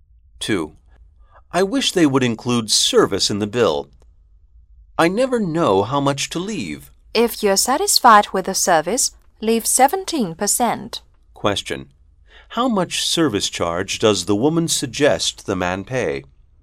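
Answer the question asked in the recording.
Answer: 17%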